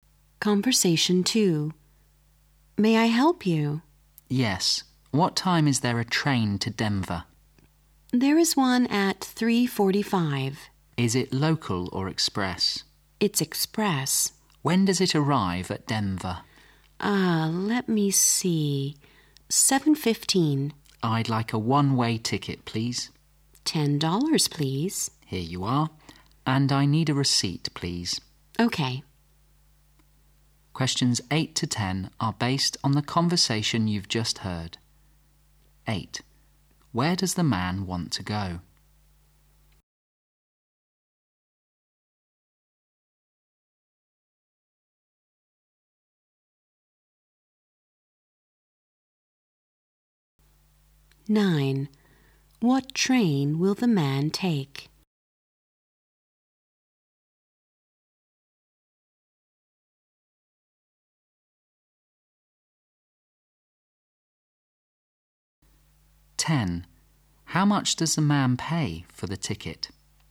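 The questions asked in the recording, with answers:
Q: Where does the man want to go?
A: Denver

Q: What train will the man take?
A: The 3:45 express train

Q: How much does the man pay for the ticket?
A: $10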